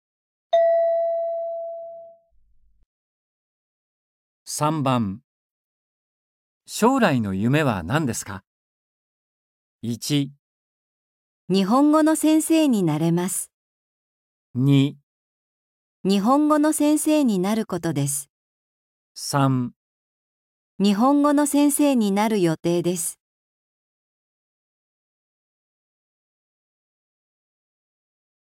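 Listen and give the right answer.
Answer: 2

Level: N4.36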